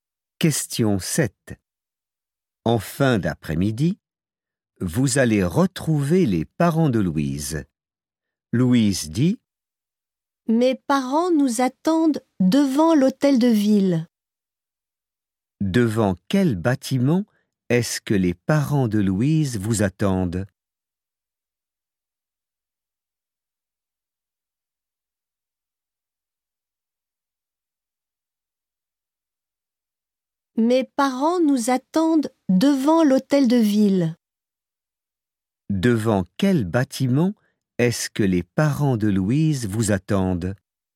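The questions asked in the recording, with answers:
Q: Devant quel bâtiment est-ce que les parents de Louise vous attendent?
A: Devant l'hôtel de ville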